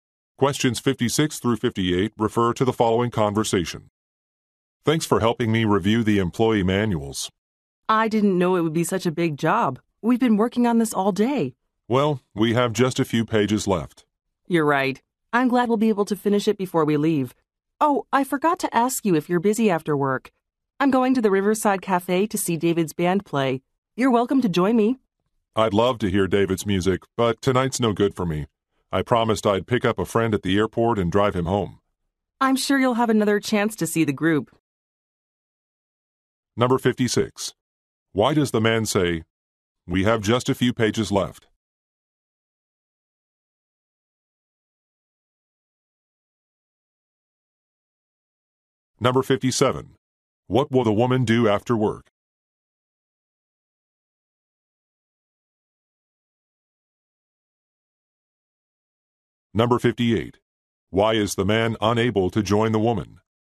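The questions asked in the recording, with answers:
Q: Why does the man say, "We have just a few pages left"?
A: To say the job is almost done

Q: What will the woman do after work?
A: See David's band play at the Riverside Cafe

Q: Why is the man unable to join the woman?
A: He has to pick up a friend at the airport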